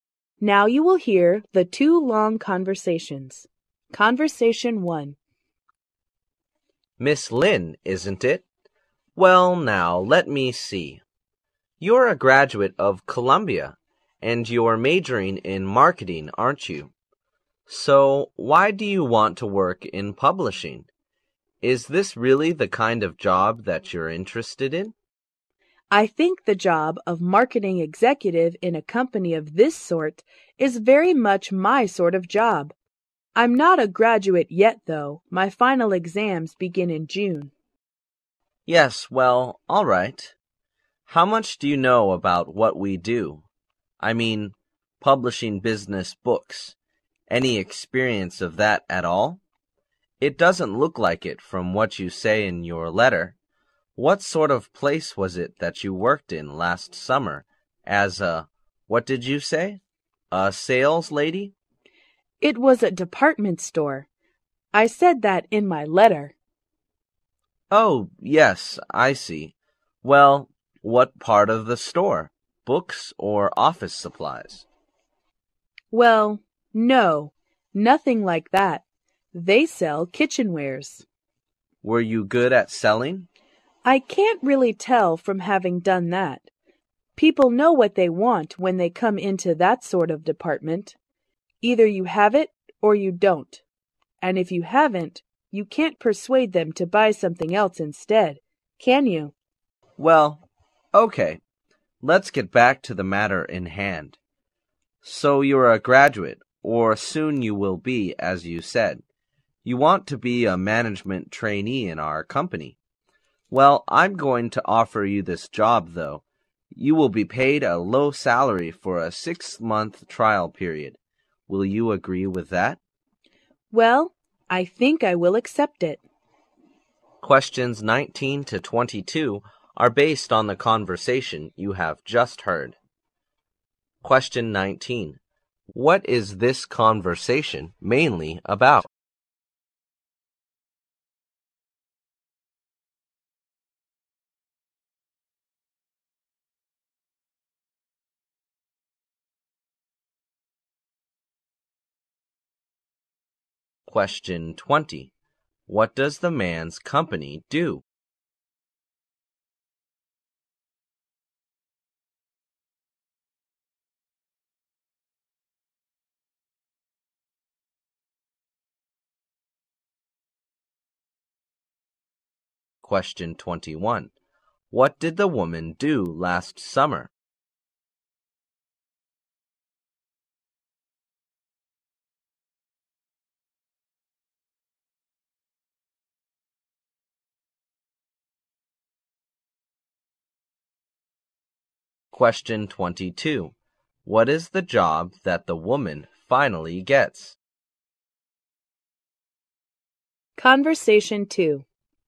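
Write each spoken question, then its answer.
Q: What is this conversation mainly about?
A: A job interview

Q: What does the man's company do?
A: Publishes business books

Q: What did the woman do last summer?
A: She worked as a saleslady selling kitchenware in a department store

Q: What is the job that the woman finally gets?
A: Management trainee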